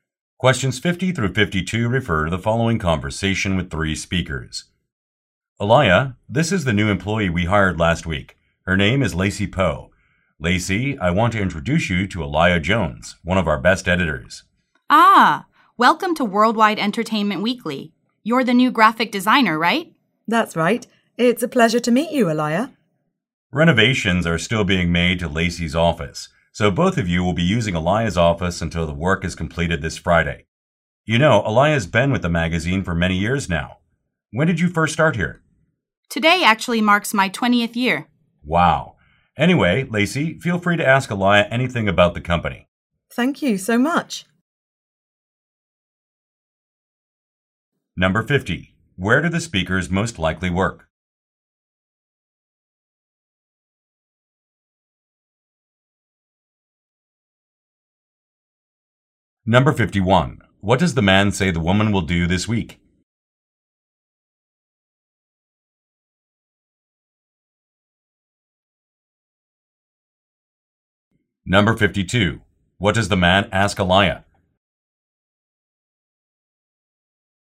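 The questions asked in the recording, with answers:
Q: Where do the speakers most likely work?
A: At a magazine

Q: What does the man say the woman will do this week?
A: Share Aliyah's office

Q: What does the man ask Aliyah?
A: When she started working there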